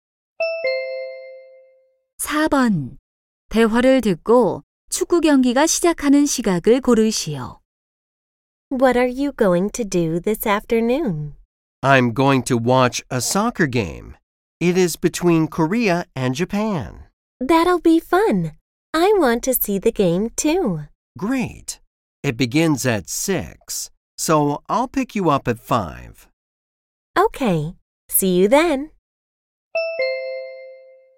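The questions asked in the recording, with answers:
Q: 대화를 듣고 축구 경기가 시작하는 시각을 고르시오.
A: 6시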